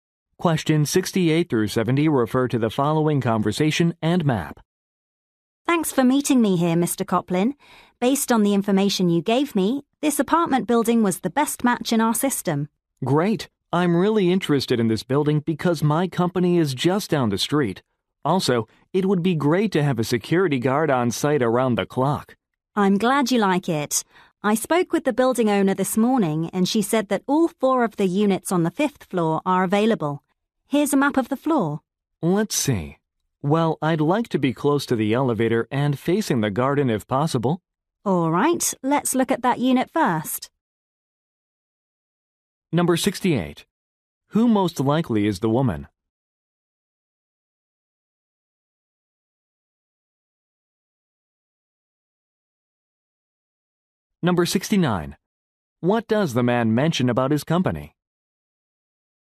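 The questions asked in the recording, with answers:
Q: Who most likely is the woman?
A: A real estate agent

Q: What does the man mention about his company?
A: It is just down the street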